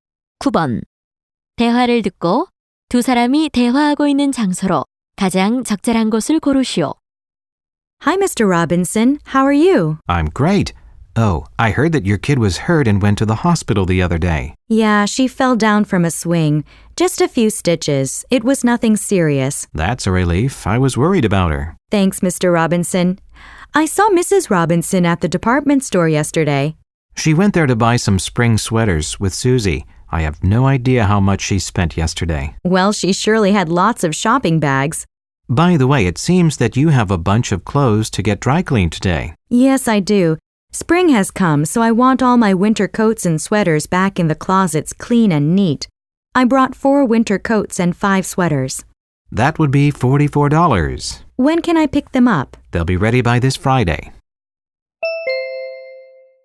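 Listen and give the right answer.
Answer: 세탁소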